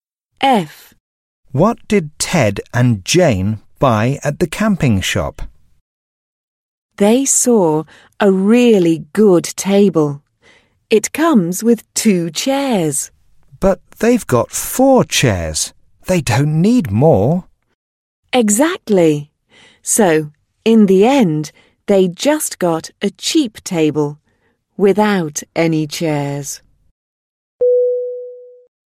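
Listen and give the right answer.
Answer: A cheap table without any chairs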